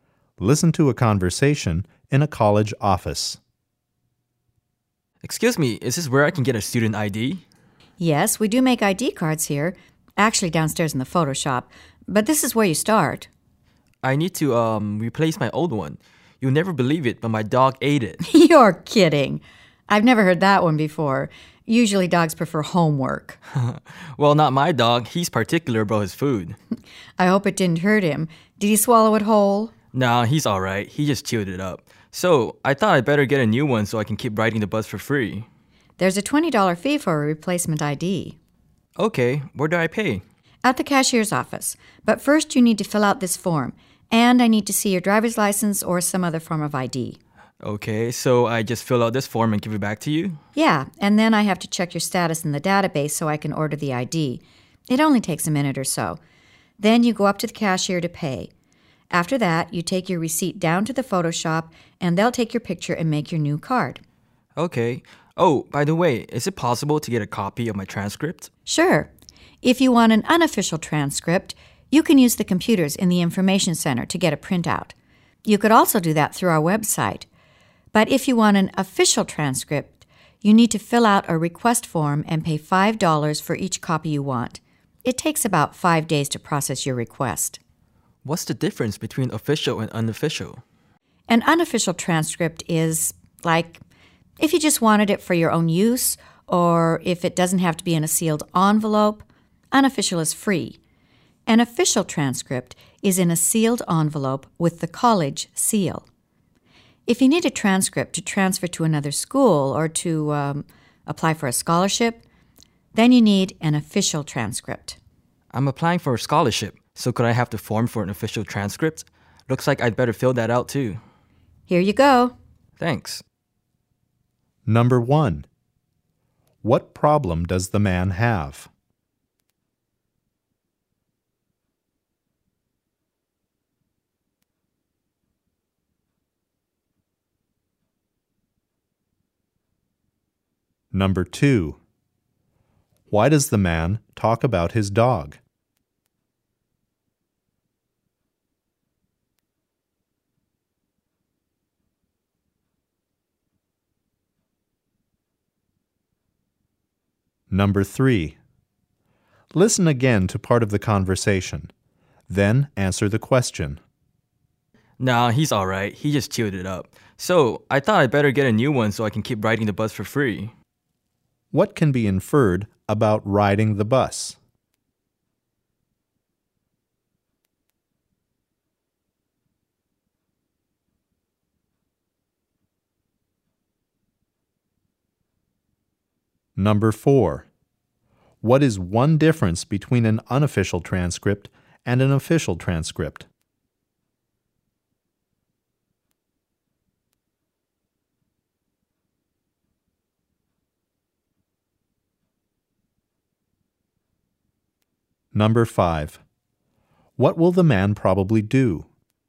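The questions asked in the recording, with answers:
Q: What problem does the man have?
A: He needs to replace his student ID card because his dog chewed it up.

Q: Why does the man talk about his dog?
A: To explain why he needs a new ID card.

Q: What can be inferred about riding the bus?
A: Students can ride the bus for free if they show a student ID.

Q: What is one difference between an unofficial transcript and an official transcript?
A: An official transcript comes in a sealed envelope and costs $5, but an unofficial one is free.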